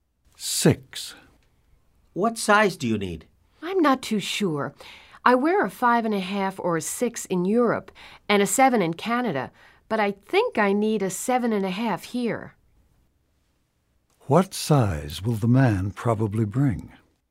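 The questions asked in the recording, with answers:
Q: What size will the man probably bring?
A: 7.5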